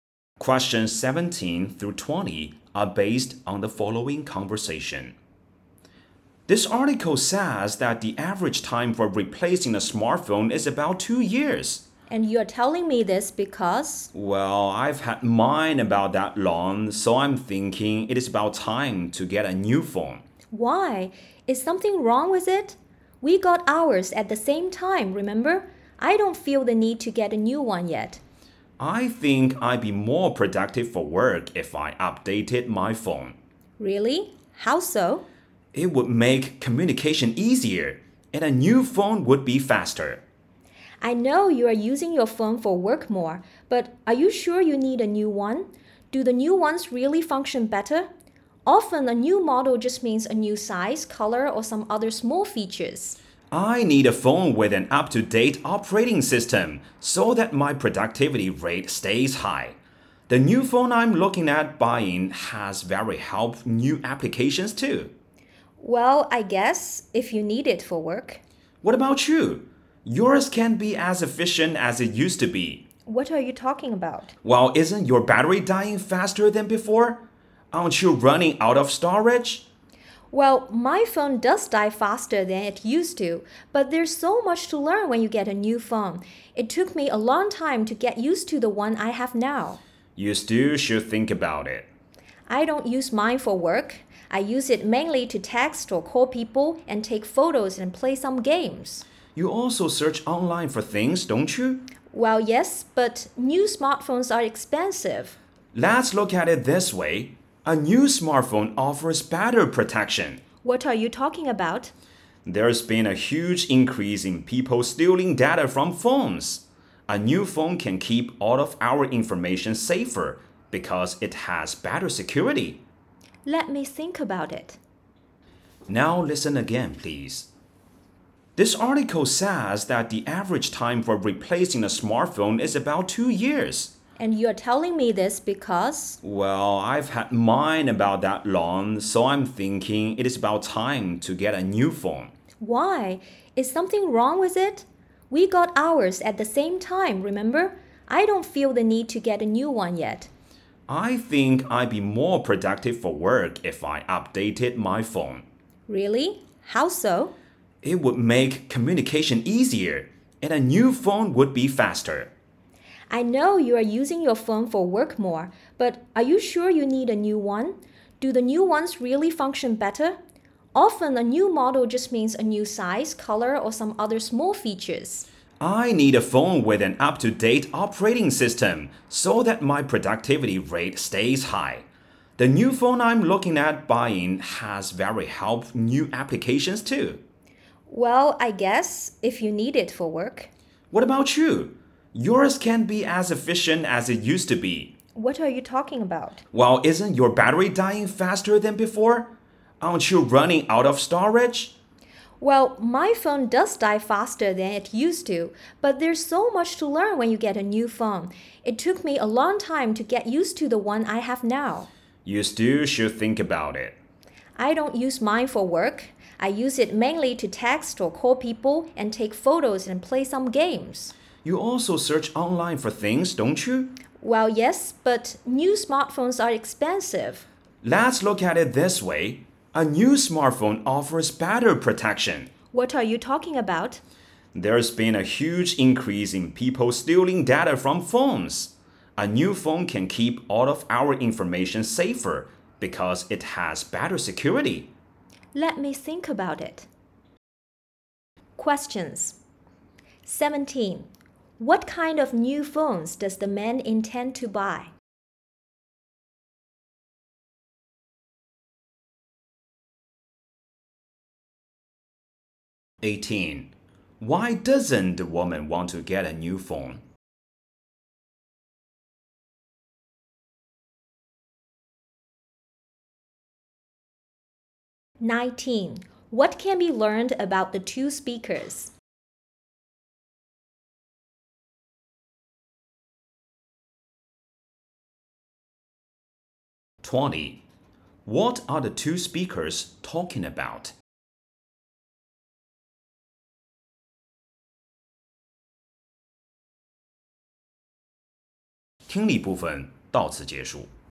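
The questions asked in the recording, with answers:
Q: What kind of new phones does the man intend to buy?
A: One with an up-to-date operating system and helpful new apps

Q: What are the two speakers talking about?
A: Whether to replace their smartphones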